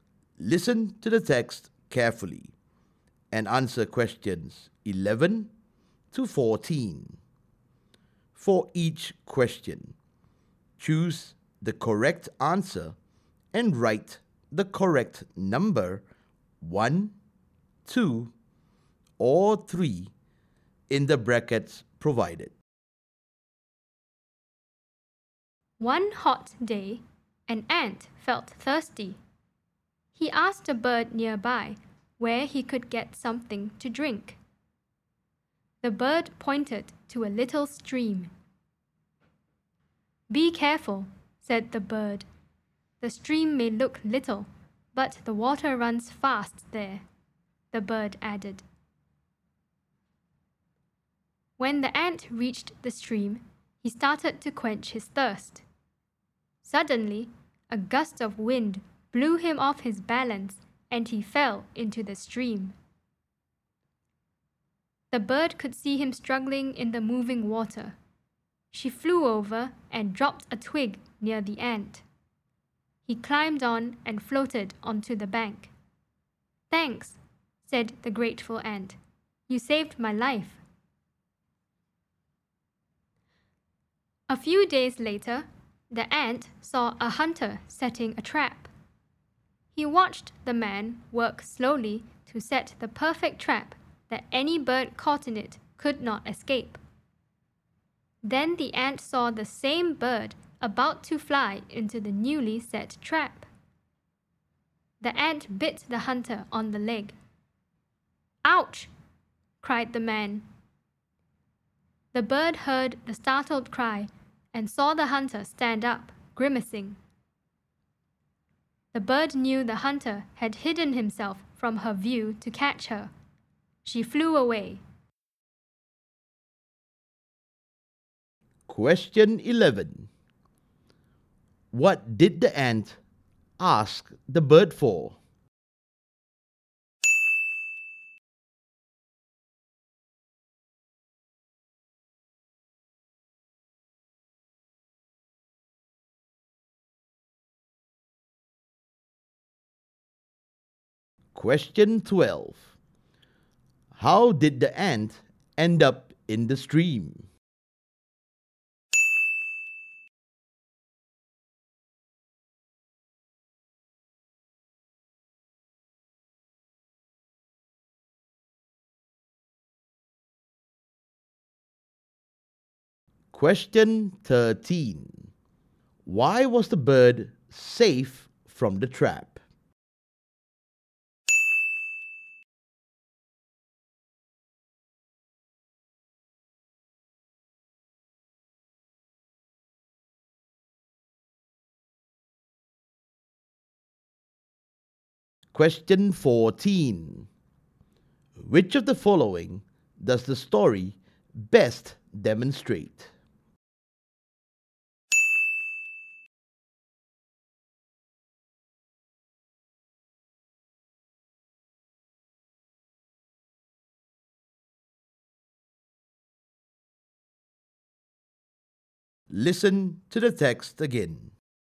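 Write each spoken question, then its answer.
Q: What did the ant ask the bird for?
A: Where he could get something to drink

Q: How did the ant end up in the stream?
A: A gust of wind blew him off balance and he fell in

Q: Why was the bird safe from the trap?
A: The ant bit the hunter, whose cry warned the bird, so she flew away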